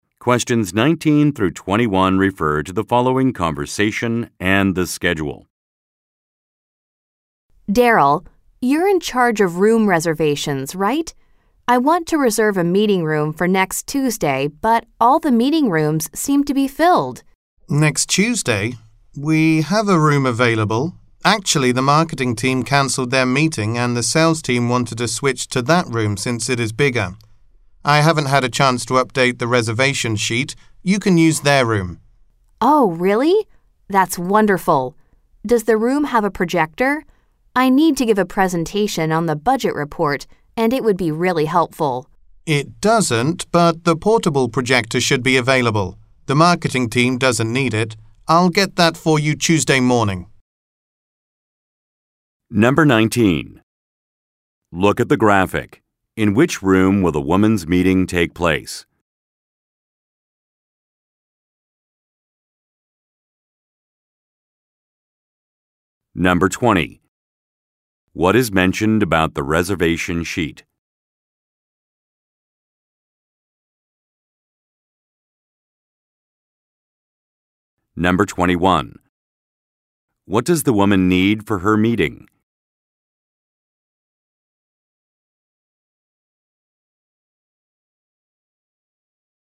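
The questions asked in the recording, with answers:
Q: What is mentioned about the reservation sheet?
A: It has not been updated yet.

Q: What does the woman need for her meeting?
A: A projector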